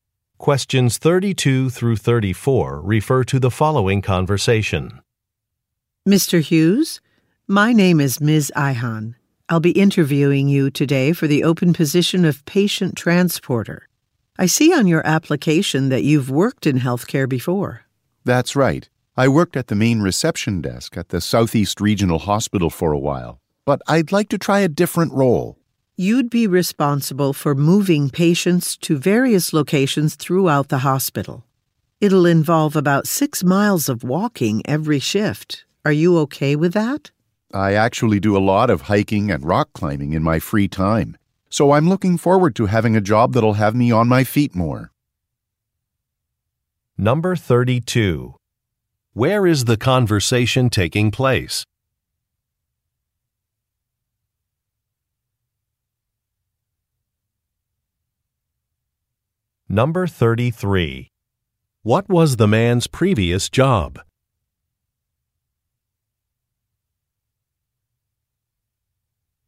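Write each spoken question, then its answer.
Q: Where is the conversation taking place?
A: At a hospital

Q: What was the man's previous job?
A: Receptionist at a hospital's main reception desk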